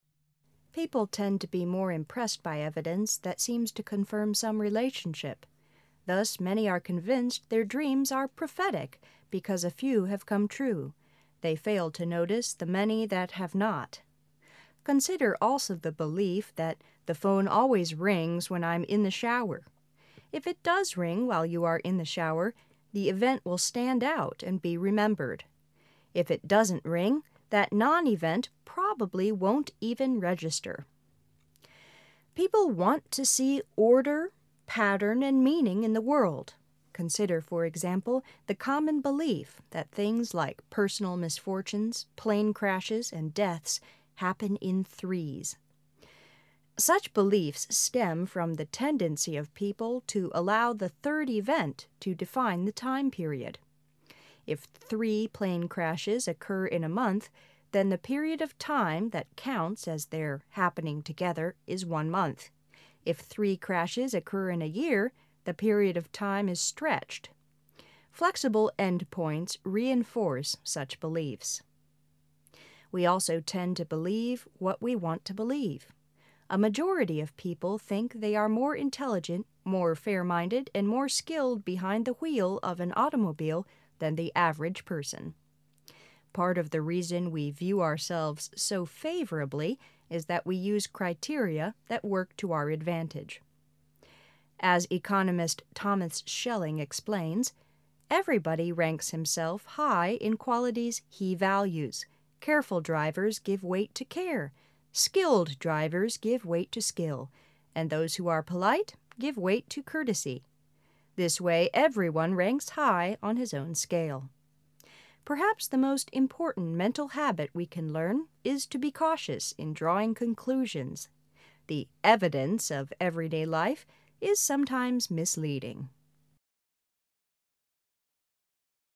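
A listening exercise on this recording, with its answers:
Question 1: Thus many are 1 their dreams are prophetic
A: convinced

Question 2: They fail to 2 the many that have not.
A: notice

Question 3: the event will stand out and be 3 .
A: remembered

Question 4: People want to see order, 4 and meaning in the world.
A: pattern

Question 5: Consider, for example, the 5 belief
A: common

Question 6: Such beliefs stem from the 6 of people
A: tendency

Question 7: to allow the third event to 7 the time period.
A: define

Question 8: happening 8 "is one month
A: together

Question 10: 10 As economist Thomas Schelling explains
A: Part of the reason we view ourselves so favorably is that we use criteria that work to our advantage.

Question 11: 11 .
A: The evidence of everyday life is sometimes misleading.

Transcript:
People tend to be more impressed by evidence that seems to confirm some relationship. 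Thus many are 1 their dreams are prophetic (预言的) because a few have come true; They fail to 2 the many that have not. Consider also the belief that "the phone always rings when I' m in the shower." If it does ring while you are in the shower, the event will stand out and be 3 . If it doesn't ring, that non-event probably won't even register (留下印象). Consider, for example, the 5 belief that things like personal misfortunes, plane crashes, and deaths "happen in threes." Such beliefs stem from the 6 of people to allow the third event to 7 the time period.
Consider, for example, the common belief that things like personal misfortunes, plane crashes, and deaths "happen in threes." Such beliefs stem from the tendency of people to allow the third event to define the time period, ff three plane crashes occur in a month, then the period of time that counts as their "happening together" is one month; if three crashes occur in a year, the period of time is stretched. 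Flexible end points reinforce such beliefs. We also tend to believe what we want to believe. A majority of people think they are more intelligent, more fair - minded and more skilled behind the wheel of an automobile than the average person. Part of the reason we view ourselves so favorably is that we use criteria that work to our advantage. As economist Thomas Schelling explains, "Everybody ranks himself high in qualities he values: careful drivers give weight to care, skilled drivers give weight to skill, and those who are polite give weight to courtesy, "This way everyone ranks high on his own scale. Perhaps the mast important mental habit we can learn is to be cautious (谨慎的) in drawing conclusions. The "evidence" of every day life is sometimes misleading.
notice
remembered
pattern
common
tendency
define
together
Flexible end points reinforce such beliefs.
The "evidence" of everyday life is sometimes misleading.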